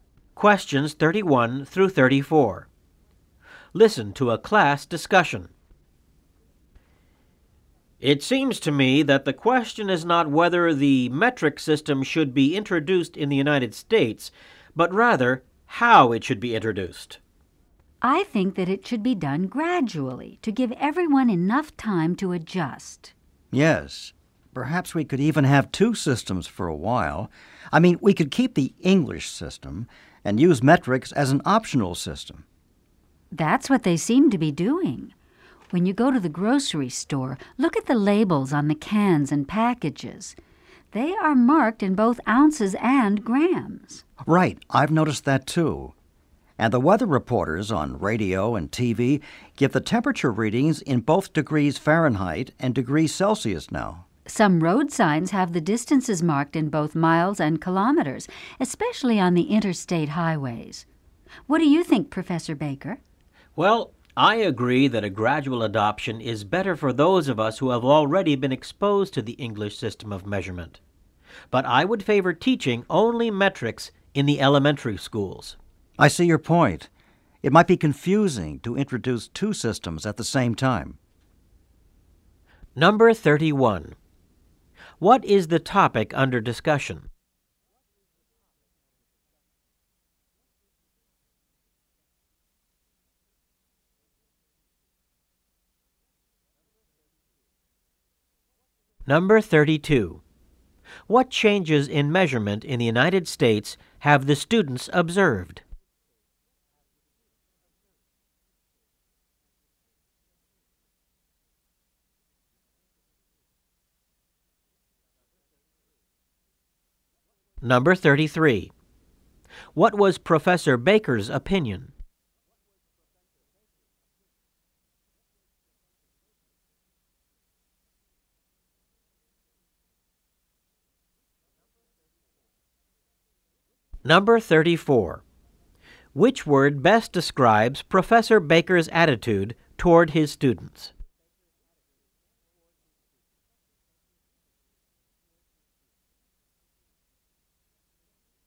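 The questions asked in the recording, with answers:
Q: What is the topic under discussion?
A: How the metric system should be introduced in the United States

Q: What changes in measurement in the United States have the students observed?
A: Labels, temperatures and road signs given in both English and metric units

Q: What was Professor Baker's opinion?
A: Gradual adoption for adults, but only metrics taught in elementary schools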